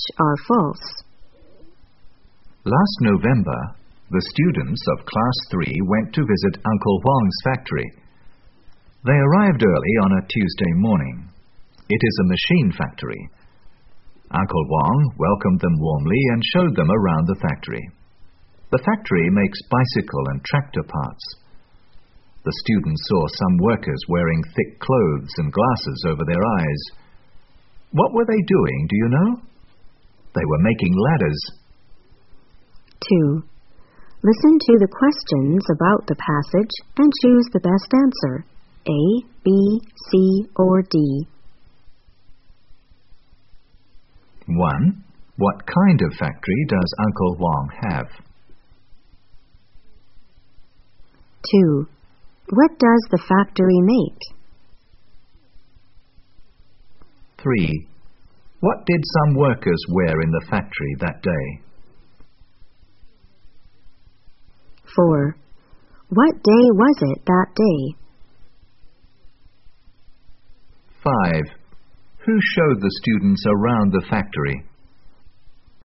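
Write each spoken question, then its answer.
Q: What kind of factory does Uncle Huang have?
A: A machine factory

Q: What does the factory make?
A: Bicycle and tractor parts

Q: What did some workers wear in the factory that day?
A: Thick clothes and glasses over their eyes

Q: What day was it that day?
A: Tuesday

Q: Who showed the students around the factory?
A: Uncle Huang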